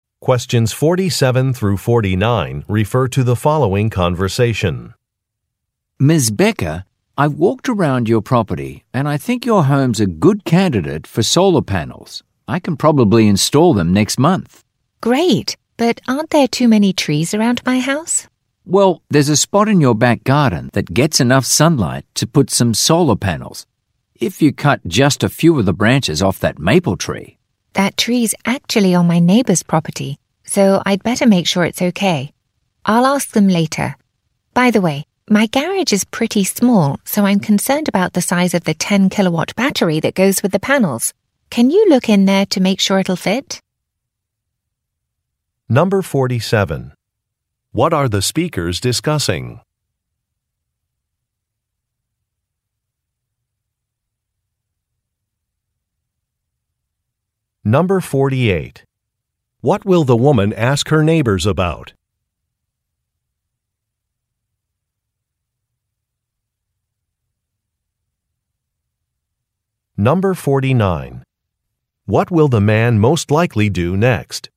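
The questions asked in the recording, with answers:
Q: What are the speakers discussing?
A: Installing solar panels

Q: What will the woman ask her neighbors about?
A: Cutting branches off their maple tree

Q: What will the man most likely do next?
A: Look in the garage to check the battery will fit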